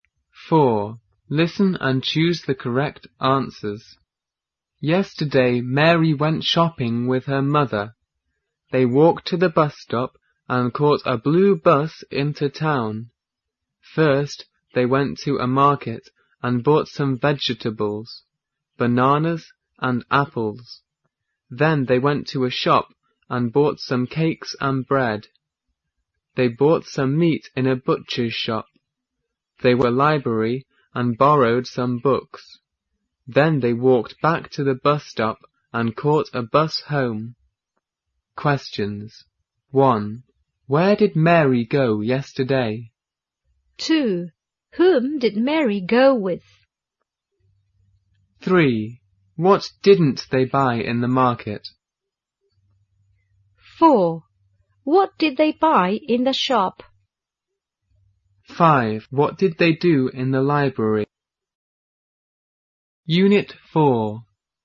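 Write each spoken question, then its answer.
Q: Where did Mary go yesterday?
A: She went shopping in town.

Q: Whom did Mary go with?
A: Her mother.

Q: What did they buy in the shop?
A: Some cakes and bread.

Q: What did they do in the library?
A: They borrowed some books.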